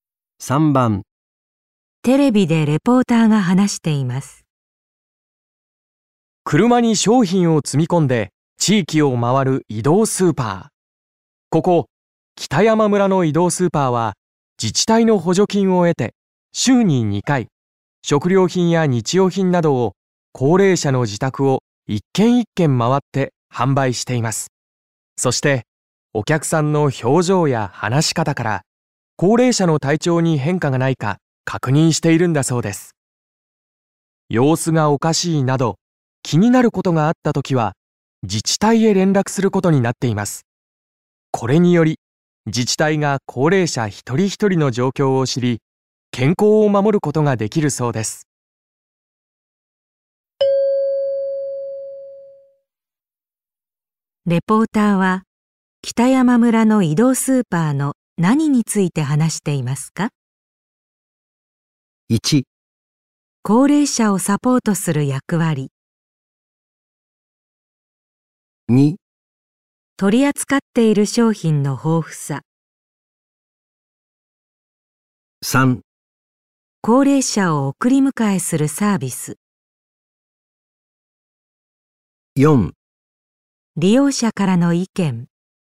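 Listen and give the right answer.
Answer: 1: 高齢者をサポートする役割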